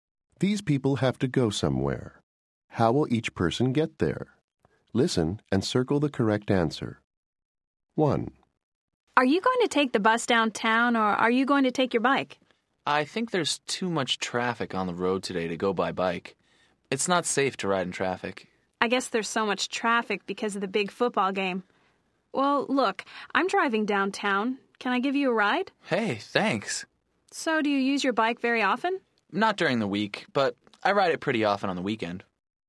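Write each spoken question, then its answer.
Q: How will each person get there?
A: By car (a friend gives a ride)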